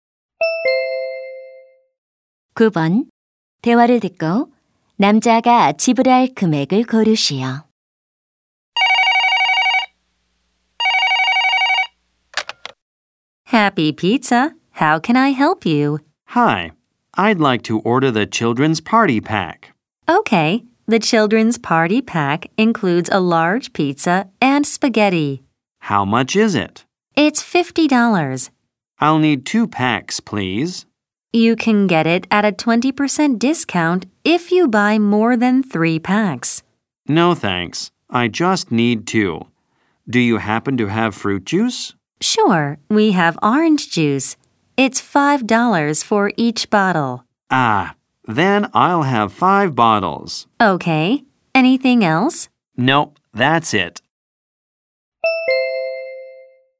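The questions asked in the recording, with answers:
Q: 대화를 듣고 남자가 지불할 금액을 고르시오.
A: $125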